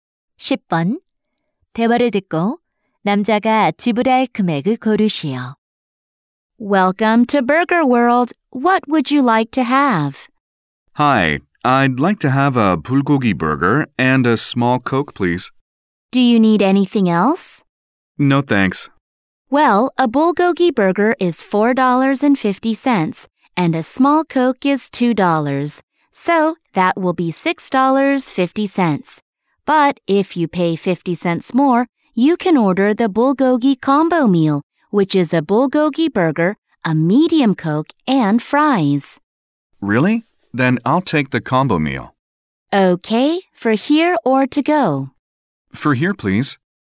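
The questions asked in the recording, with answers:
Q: 대화를 듣고 남자가 지불할 금액을 고르시오.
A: 7달러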